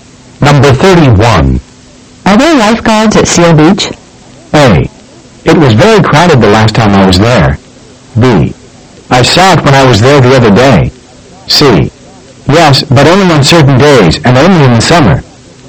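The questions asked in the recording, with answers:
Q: Are there lifeguards at Seal Beach?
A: C: Yes, but only on certain days, and only in the summer.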